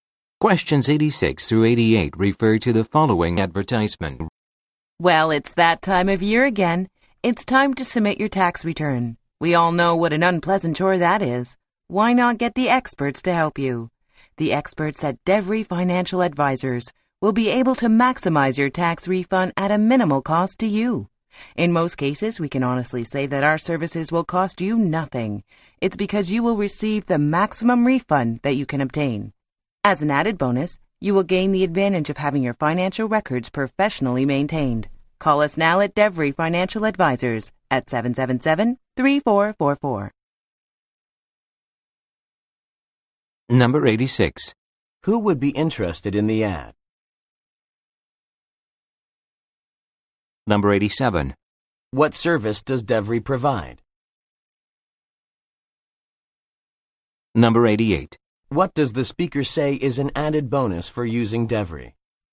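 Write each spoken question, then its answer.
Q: Who would be interested in the ad?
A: People who need to submit a tax return

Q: What service does DEVRE provide?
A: Tax return preparation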